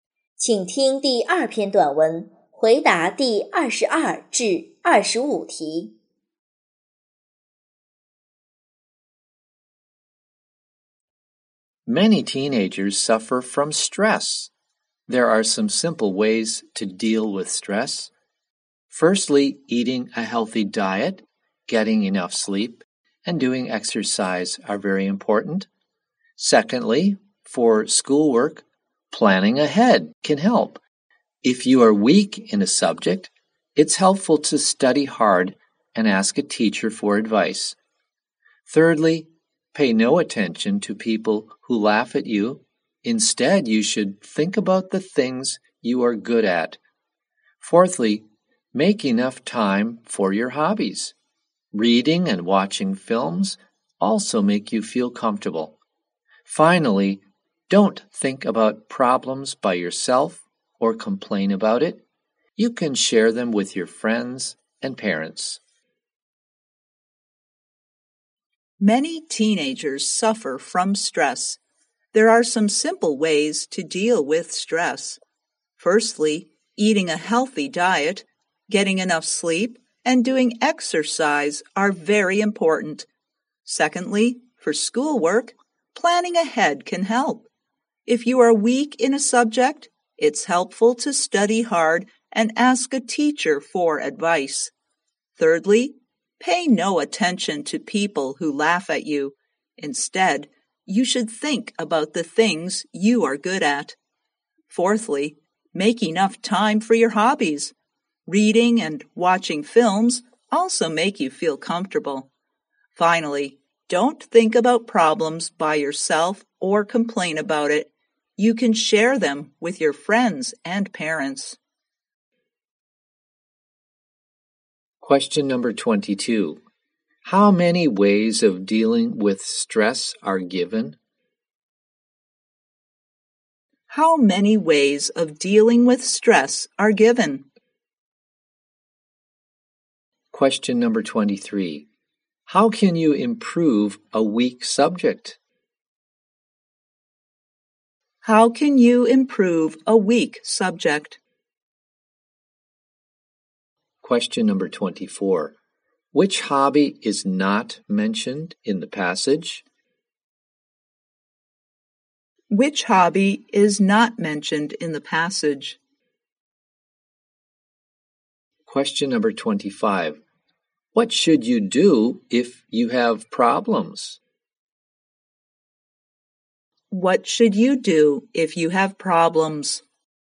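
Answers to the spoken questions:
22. Five
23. Study hard and ask a teacher for advice
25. Share them with your friends and parents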